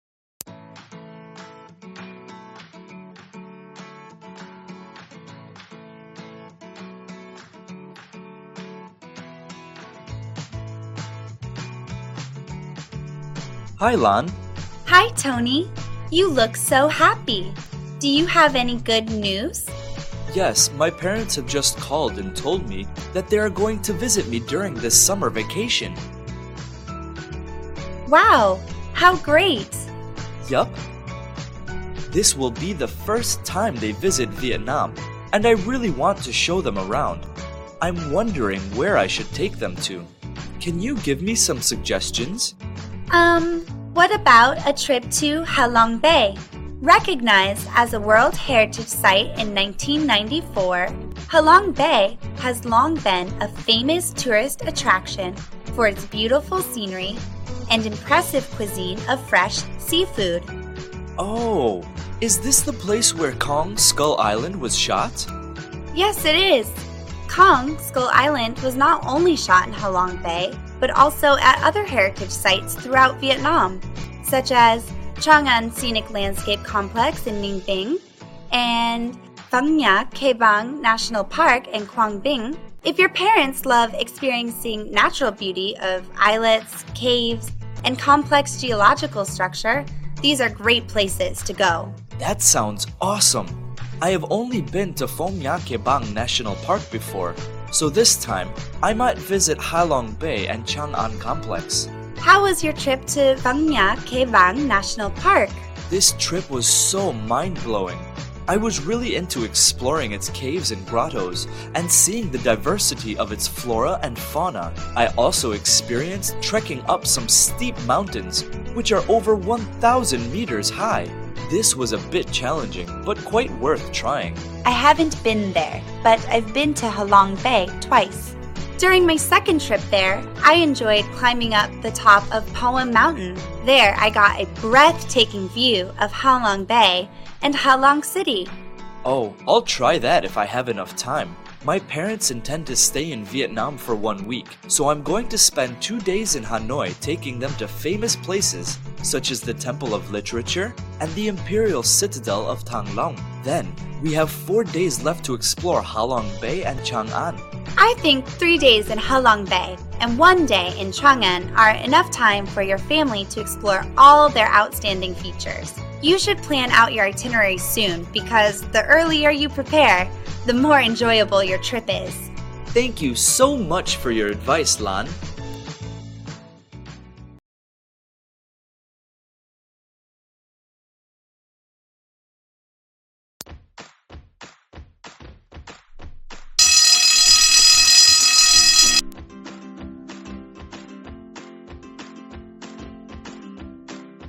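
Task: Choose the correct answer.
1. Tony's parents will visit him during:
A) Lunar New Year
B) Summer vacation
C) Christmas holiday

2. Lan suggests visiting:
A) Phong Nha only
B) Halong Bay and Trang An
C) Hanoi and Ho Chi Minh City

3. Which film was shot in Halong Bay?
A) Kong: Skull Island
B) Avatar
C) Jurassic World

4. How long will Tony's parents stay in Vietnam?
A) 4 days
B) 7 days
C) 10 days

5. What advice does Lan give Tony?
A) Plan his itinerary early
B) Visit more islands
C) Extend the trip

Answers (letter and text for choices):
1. B) Summer vacation
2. B) Halong Bay and Trang An
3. A) Kong: Skull Island
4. B) 7 days
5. A) Plan his itinerary early

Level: lớp 11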